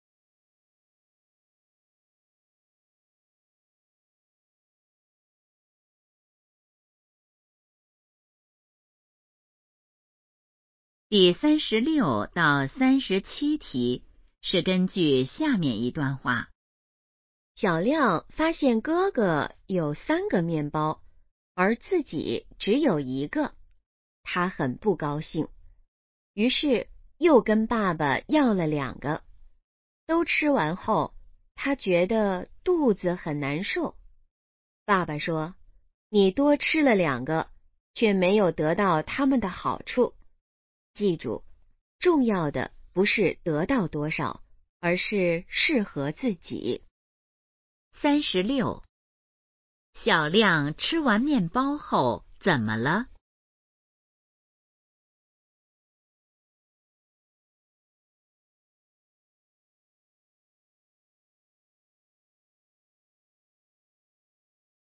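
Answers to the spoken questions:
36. 肚子很难受
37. 适合自己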